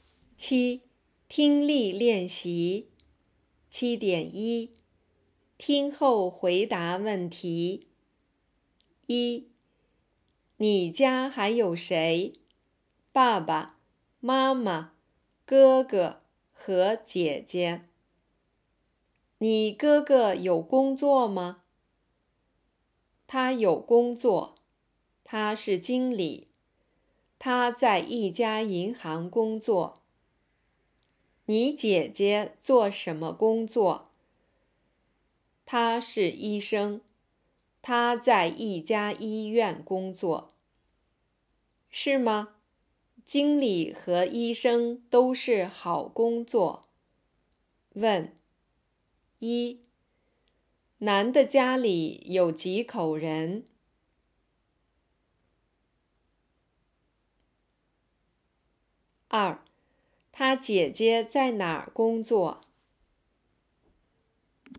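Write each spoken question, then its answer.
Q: 男的家里有几口人?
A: 五口人

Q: 他姐姐在哪儿工作?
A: 在一家医院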